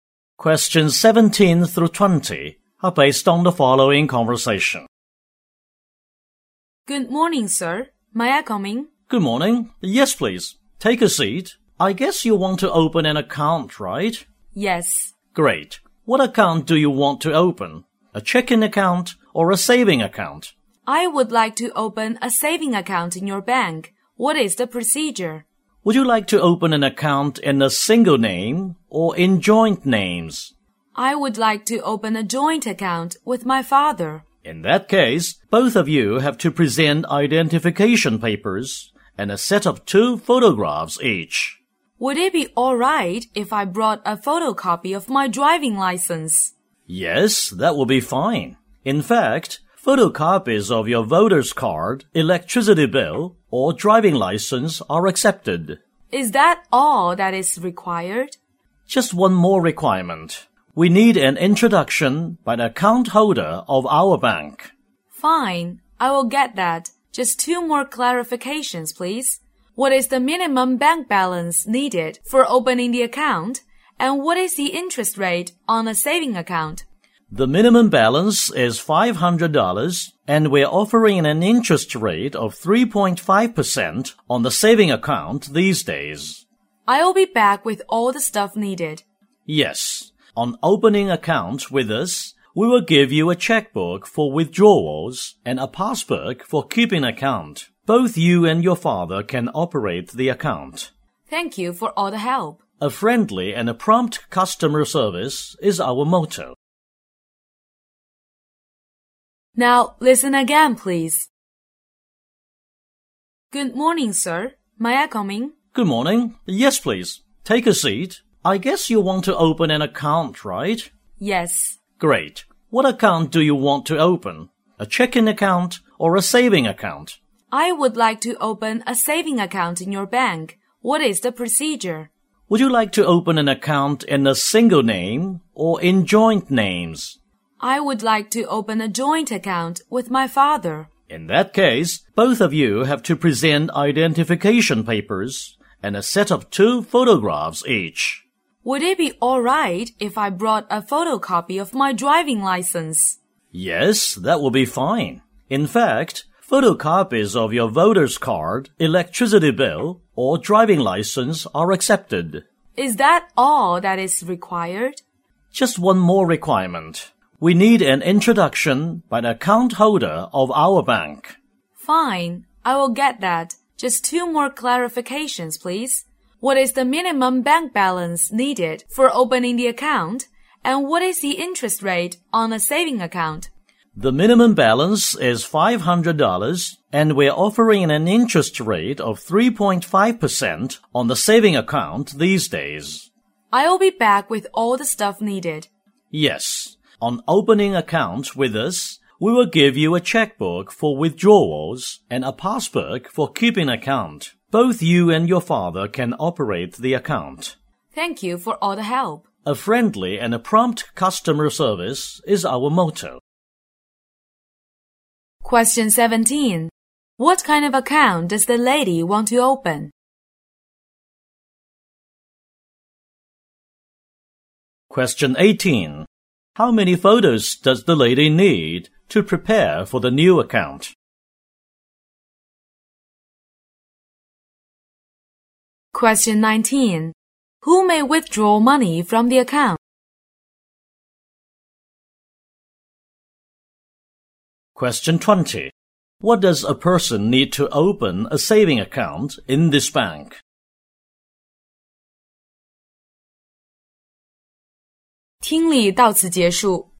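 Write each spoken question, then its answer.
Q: What kind of account does the lady want to open?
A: A joint saving account with her father

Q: How many photos does the lady need to prepare for the new account?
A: Two

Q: Who may withdraw money from the account?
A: Both the lady and her father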